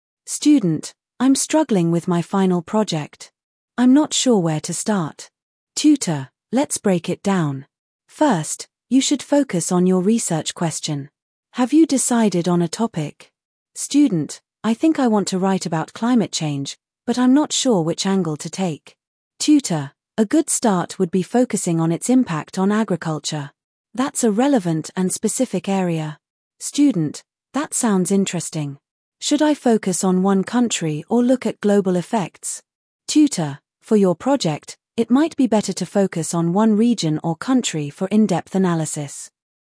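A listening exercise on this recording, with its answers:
What is the student struggling with?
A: Their final project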